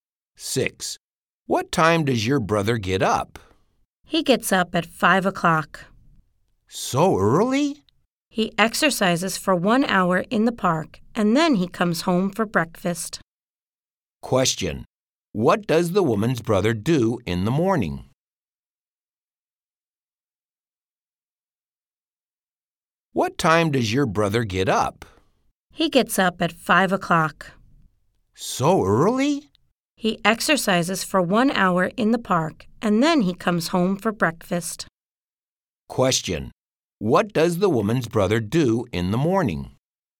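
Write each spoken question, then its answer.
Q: Question. What does the woman's brother do in the morning?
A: He exercises for an hour in the park.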